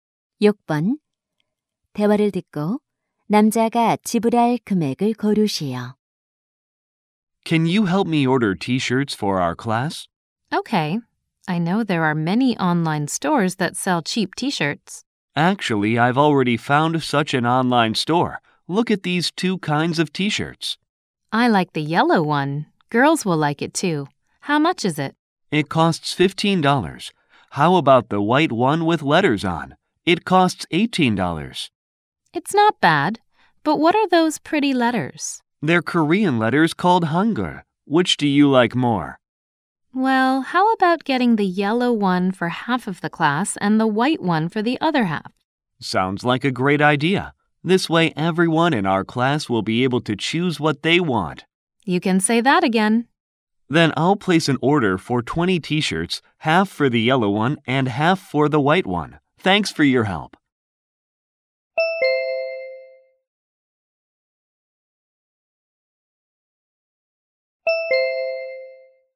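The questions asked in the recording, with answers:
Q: 대화를 듣고 남자가 지불할 금액을 고르시오.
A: $330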